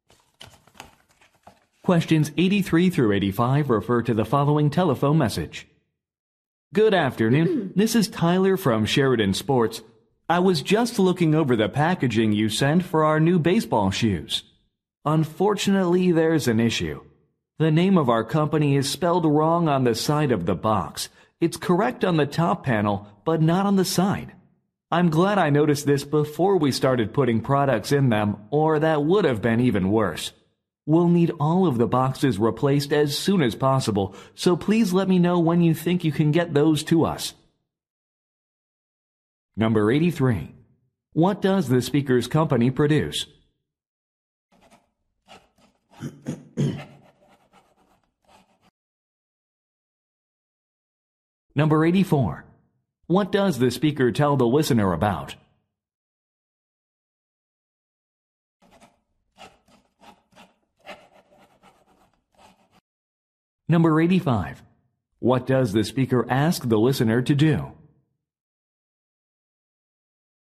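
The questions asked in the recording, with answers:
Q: What does the speaker's company produce?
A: Sports shoes

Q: What does the speaker tell the listener about?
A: A misspelling of the company name on the boxes

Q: What does the speaker ask the listener to do?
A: Tell him when the replacement boxes can be delivered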